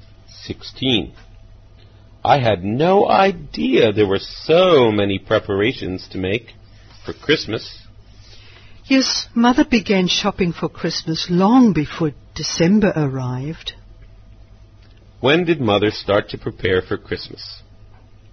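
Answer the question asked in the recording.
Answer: Long before December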